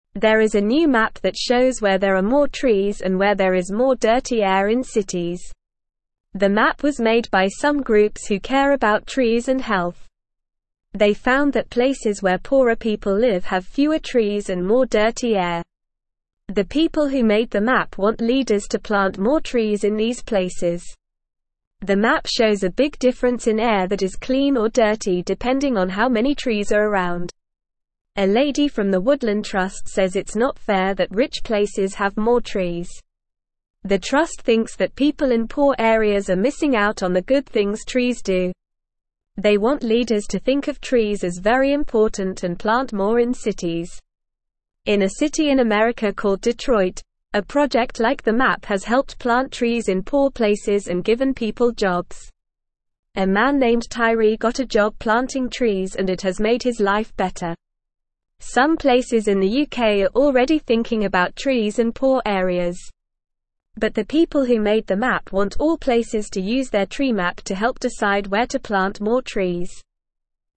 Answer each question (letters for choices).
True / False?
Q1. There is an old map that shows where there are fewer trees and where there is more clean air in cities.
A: False

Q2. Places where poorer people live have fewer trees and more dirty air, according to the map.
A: True

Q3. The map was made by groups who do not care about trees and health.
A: False

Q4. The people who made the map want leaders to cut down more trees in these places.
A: False

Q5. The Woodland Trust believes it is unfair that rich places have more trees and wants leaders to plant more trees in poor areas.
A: True

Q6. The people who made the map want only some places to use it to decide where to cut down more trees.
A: False

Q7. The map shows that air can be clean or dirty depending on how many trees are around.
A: True

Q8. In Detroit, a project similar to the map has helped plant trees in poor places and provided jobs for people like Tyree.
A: True

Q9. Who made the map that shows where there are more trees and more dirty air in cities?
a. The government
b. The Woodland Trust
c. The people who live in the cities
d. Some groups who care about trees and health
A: d

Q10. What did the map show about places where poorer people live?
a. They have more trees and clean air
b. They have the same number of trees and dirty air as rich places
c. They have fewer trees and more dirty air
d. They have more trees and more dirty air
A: c

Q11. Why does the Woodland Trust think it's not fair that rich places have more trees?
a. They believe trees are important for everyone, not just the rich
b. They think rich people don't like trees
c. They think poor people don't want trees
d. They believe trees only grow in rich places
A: a

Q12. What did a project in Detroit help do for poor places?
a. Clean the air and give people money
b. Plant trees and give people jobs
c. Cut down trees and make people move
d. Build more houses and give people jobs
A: b

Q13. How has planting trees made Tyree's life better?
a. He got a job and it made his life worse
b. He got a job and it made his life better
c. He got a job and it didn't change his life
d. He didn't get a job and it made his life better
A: b

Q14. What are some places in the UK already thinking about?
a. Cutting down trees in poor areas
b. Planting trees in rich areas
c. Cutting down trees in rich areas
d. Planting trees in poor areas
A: d

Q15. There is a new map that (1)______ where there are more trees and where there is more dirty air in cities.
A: shows

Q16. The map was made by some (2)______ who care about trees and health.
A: groups

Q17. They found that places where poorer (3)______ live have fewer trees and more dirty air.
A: people

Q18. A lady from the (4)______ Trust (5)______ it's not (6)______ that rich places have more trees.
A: Woodland

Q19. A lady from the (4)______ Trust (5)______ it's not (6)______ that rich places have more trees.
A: says

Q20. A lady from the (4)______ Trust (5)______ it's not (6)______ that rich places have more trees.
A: fair

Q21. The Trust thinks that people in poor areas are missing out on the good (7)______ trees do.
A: things

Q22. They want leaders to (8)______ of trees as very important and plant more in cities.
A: think

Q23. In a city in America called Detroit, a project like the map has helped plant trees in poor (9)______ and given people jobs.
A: places

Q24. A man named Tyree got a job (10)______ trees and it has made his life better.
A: planting

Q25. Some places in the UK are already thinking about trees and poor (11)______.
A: areas

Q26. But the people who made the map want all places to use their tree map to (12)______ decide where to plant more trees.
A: help

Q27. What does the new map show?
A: The new map shows where there are more trees and where there is more dirty air in cities.

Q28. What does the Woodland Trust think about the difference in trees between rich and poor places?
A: The Woodland Trust thinks it's not fair that rich places have more trees and believes that people in poor areas are missing out on the benefits of trees.

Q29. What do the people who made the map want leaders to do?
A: The people who made the map want leaders to plant more trees in poor areas.

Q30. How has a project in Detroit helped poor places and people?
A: The project in Detroit has helped poor places and people by planting trees and creating jobs.

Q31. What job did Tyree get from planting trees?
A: Tyree got a job planting trees.

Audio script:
There is a new map that shows where there are more trees and where there is more dirty air in cities. The map was made by some groups who care about trees and health. They found that places where poorer people live have fewer trees and more dirty air. The people who made the map want leaders to plant more trees in these places.
The map shows a big difference in air that is clean or dirty depending on how many trees are around. A lady from the Woodland Trust says it's not fair that rich places have more trees. The Trust thinks that people in poor areas are missing out on the good things trees do. They want leaders to think of trees as very important and plant more in cities.
In a city in America called Detroit, a project like the map has helped plant trees in poor places and given people jobs. A man named Tyree got a job planting trees and it has made his life better. Some places in the UK are already thinking about trees and poor areas. But the people who made the map want all places to use their tree map to help decide where to plant more trees.

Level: Level 2